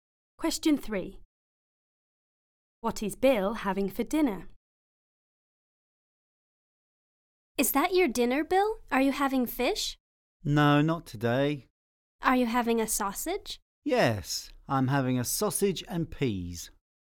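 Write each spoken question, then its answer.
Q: What is Bill having for dinner?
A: A sausage and peas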